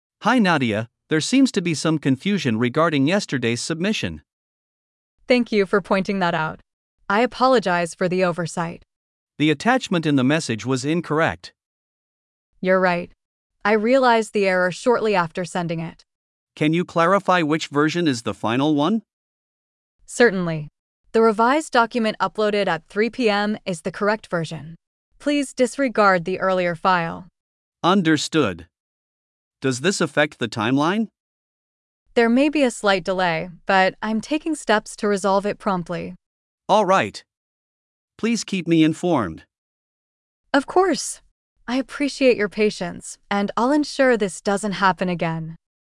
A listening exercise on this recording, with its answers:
Complete the phrases as you listen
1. Hi Nadia, there seems to be some confusion ______ yesterday's submission.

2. Thank you for pointing that out. I apologize for the ______.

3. The ______ in the message was incorrect.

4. I realized the error shortly after ______ it.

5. Can you clarify which ______ is the final one?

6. The revised document uploaded at 3 PM is the ______ version.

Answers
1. regarding
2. oversight
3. attachment
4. sending
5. version
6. correct

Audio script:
Manager: Hi Nadia, there seems to be some confusion regarding yesterday's submission.
Nadia: Thank you for pointing that out. I apologize for the oversight.
Manager: The attachment in the message was incorrect.
Nadia: You're right. I realized the error shortly after sending it.
Manager: Can you clarify which version is the final one?
Nadia: Certainly. The revised document uploaded at 3 PM is the correct version. Please disregard the earlier file.
Manager: Understood. Does this affect the timeline?
Nadia: There may be a slight delay, but I'm taking steps to resolve it promptly.
Manager: Alright. Please keep me informed.
Nadia: Of course. I appreciate your patience, and I'll ensure this doesn't happen again.